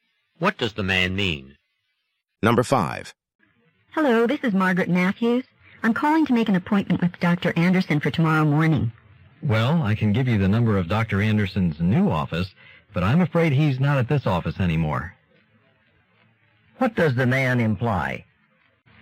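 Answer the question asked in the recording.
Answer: Dr. Anderson has moved to a new office, so she must call there to make the appointment.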